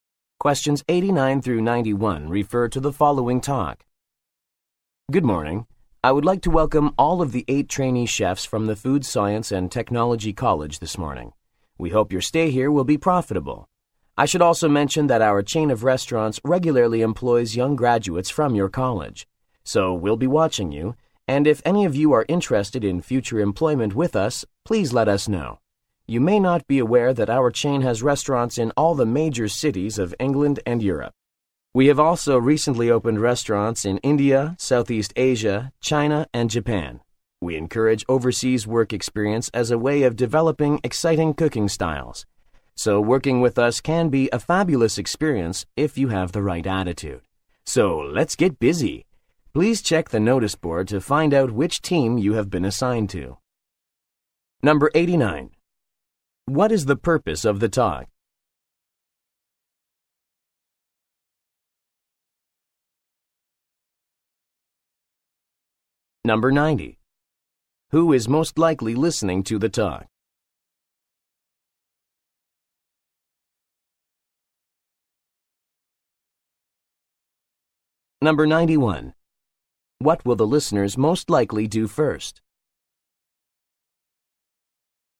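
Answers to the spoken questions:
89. To welcome trainee chefs
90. Trainee chefs
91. Check the notice board for their team assignment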